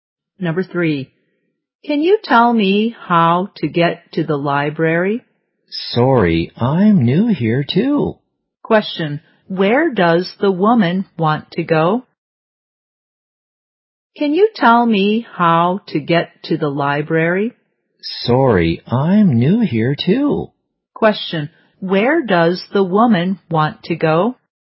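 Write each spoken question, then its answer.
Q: where does the woman want to go?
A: The library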